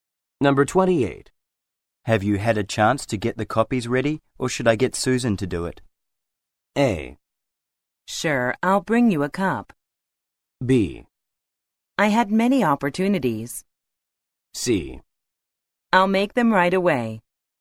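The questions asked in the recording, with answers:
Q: Have you had a chance to get the copies ready, or should I get Susan to do it?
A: C: I'll make them right away.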